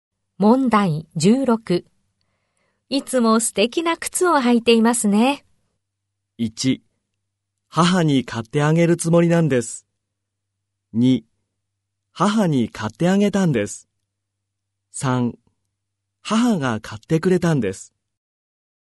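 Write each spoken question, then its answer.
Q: いつも素敵な靴を履いていますね。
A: 3: 母が買ってくれたんです。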